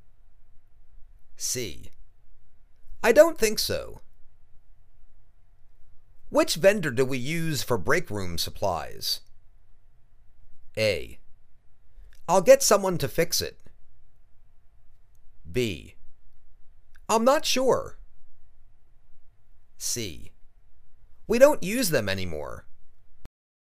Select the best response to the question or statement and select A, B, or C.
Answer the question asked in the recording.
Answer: I'm not sure.